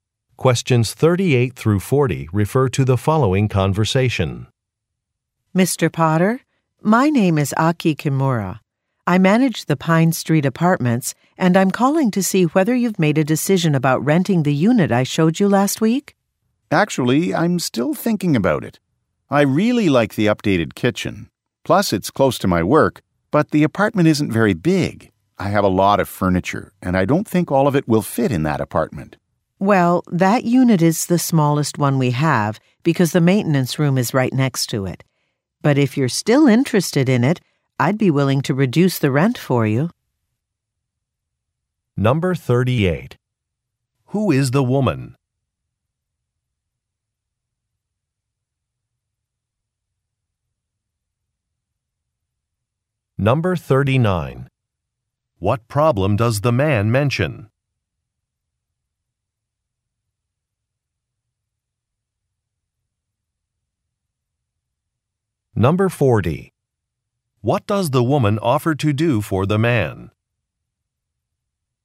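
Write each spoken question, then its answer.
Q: Who is the woman?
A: An apartment manager

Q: What problem does the man mention?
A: The apartment is too small

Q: What does the woman offer to do for the man?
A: Reduce the rent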